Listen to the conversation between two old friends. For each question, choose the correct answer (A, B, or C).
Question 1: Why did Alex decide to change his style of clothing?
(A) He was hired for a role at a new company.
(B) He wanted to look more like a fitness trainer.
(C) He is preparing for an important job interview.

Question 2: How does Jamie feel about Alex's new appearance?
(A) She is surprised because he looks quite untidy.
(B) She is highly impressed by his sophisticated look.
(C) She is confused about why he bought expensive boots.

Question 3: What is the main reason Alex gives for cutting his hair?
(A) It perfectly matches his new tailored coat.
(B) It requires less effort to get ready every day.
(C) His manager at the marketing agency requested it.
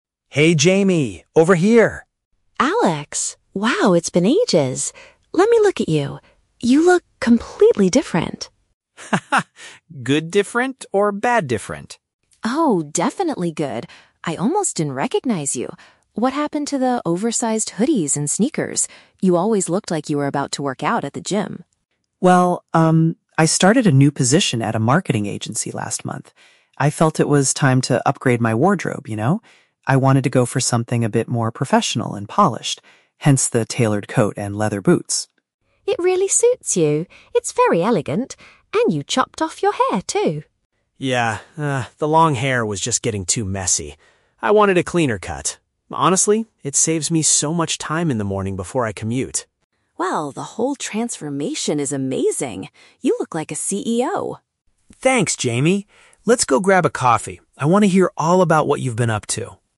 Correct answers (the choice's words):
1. He was hired for a role at a new company.
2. She is highly impressed by his sophisticated look.
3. It requires less effort to get ready every day.

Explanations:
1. Alex explains that he "started a new position at a marketing agency," which is paraphrased in option A. Option B is the trap; Jamie mentions he used to look like he was going to the gym, but that is not his current goal. Option C is plausible, but he already has the job; he isn't interviewing for one.
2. Jamie praises Alex by saying his look is "elegant," "amazing," and that he looks "like a CEO" (paraphrased as "highly impressed by his sophisticated look"). Option A is a trap because the word "messy" (untidy) is mentioned in the audio, but Alex uses it to describe his old hair, not his new look. Option C is not mentioned.
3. Alex states that the new haircut "saves me so much time in the morning," meaning it takes less effort to get ready. Option A is a trap because while the tailored coat is mentioned as part of his new style, it is not the reason he gives for the haircut. Option C is plausible for a professional setting, but the audio never mentions his manager asking him to do it.

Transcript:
Alex: Hey, Jamie! Over here!
Jamie: Alex? Wow, it's been ages! Let me look at you. You look... completely different!
Alex: Haha, good different or bad different?
Jamie: Oh, definitely good! I almost didn't recognize you. What happened to the oversized hoodies and sneakers? You always looked like you were about to work out at the gym.
Alex: Well, um, I started a new position at a marketing agency last month. I felt it was time to upgrade my wardrobe, you know? I wanted to go for something a bit more professional and polished. Hence the tailored coat and leather boots.
Jamie: It really suits you. It's very elegant. And you chopped off your hair, too!
Alex: Yeah, ah, the long hair was just getting too messy. I wanted a cleaner cut. Honestly, it saves me so much time in the morning before I commute.
Jamie: Well, the whole transformation is amazing. You look like a CEO!